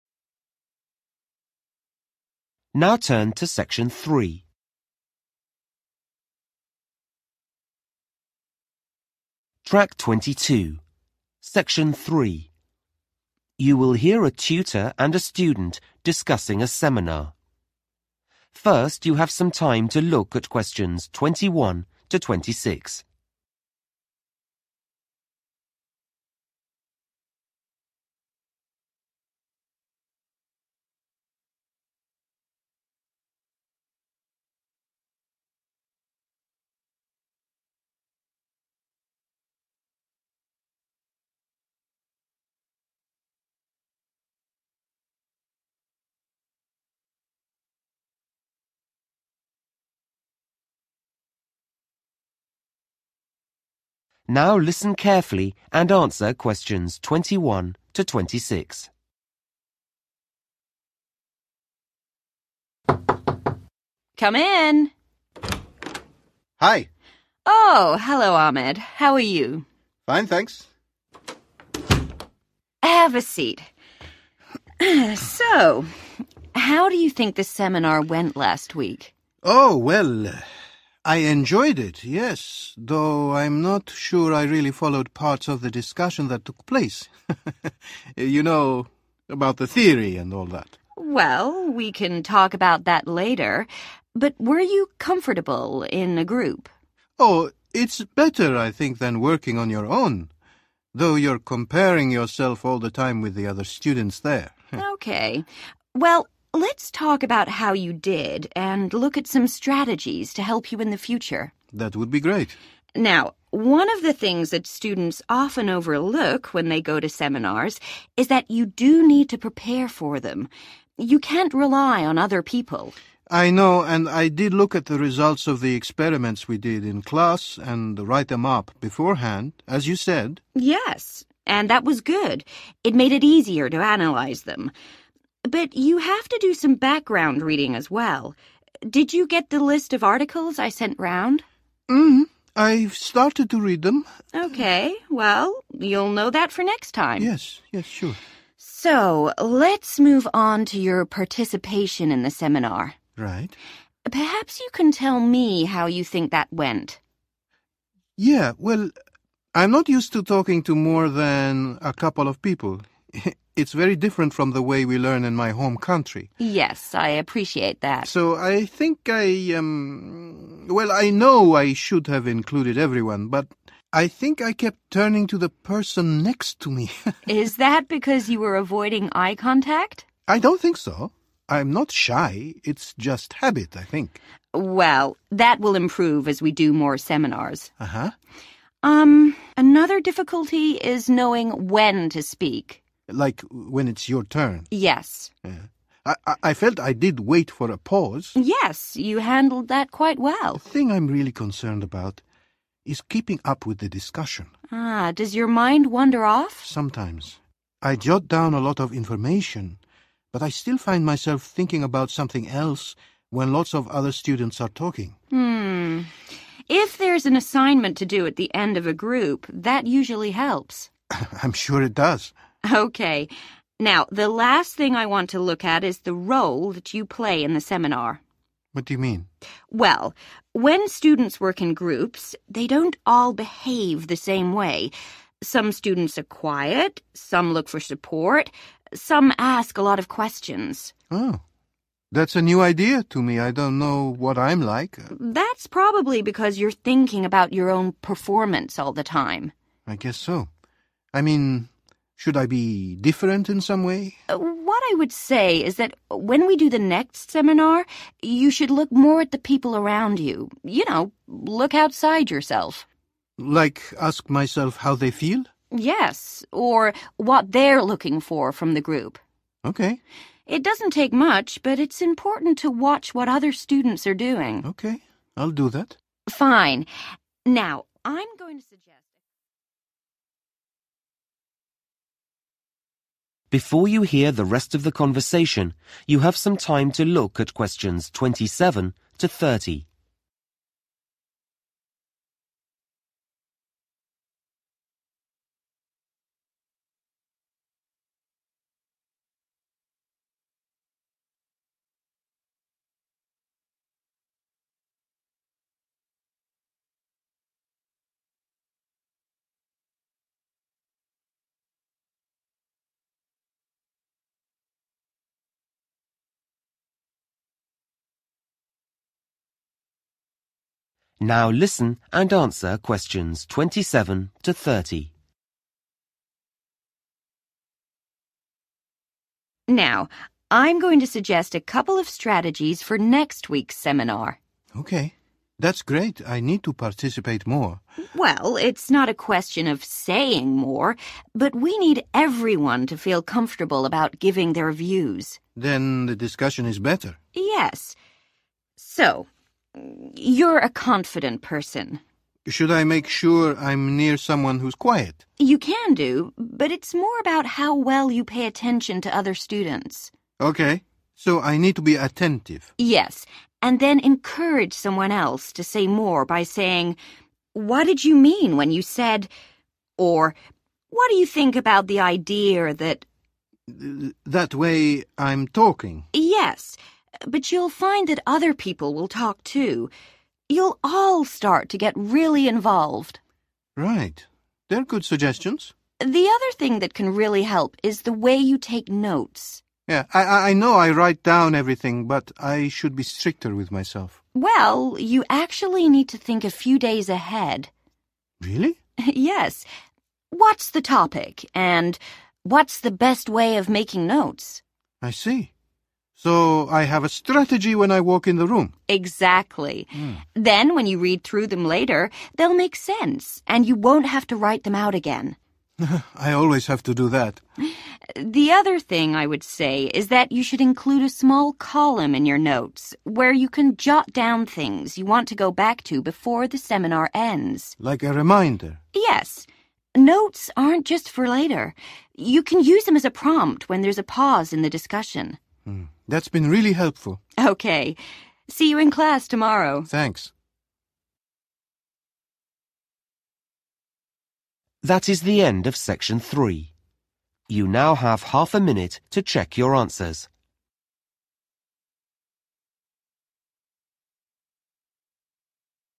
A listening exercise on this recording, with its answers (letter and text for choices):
Choose the correct letter, A, B or C.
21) What does Ahmed say about last week's seminar?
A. He wasn't aide to get there on time.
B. He didn't know all the modems.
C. He couldn't understand everything.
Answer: C. He couldn't understand everything.

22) What does the tutor say about Ahmed's preparation for the seminar?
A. He was better prepared than some students.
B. He completed some useful work.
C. He read some useful articles.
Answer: B. He completed some useful work.

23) What does Ahmed say about his participation in the seminar?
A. He tended to speak to his neighbour only.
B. He spoke when other students were talking.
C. He felt embarrassed when students looked at him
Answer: A. He tended to speak to his neighbour only.

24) What does Ahmed worry about most in seminars?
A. speaking at the right time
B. taking enough notes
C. staying focused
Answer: C. staying focused

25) What does Ahmed say about his role in the group?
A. He hasn't thought about it.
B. He'd like to change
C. He feels he is acting a part.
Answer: A. He hasn't thought about it.

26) At the next seminar, Ahmed, tutor suggests that he should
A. give other modems more help with their work.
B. observe the behaviour of other students.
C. ask other students for their views.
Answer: B. observe the behaviour of other students.